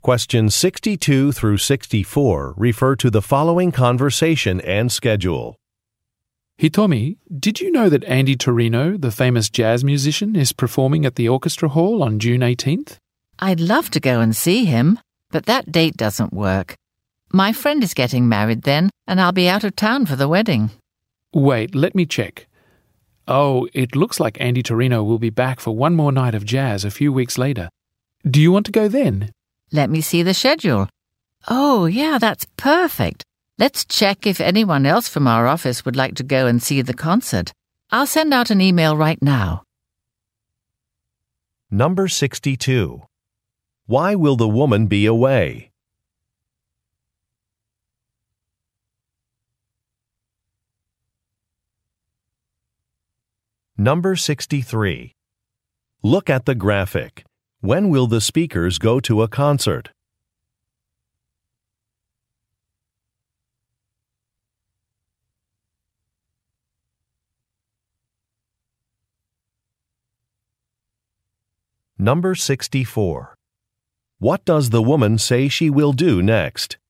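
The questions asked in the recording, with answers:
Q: Why will the woman be away?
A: To attend a friend's wedding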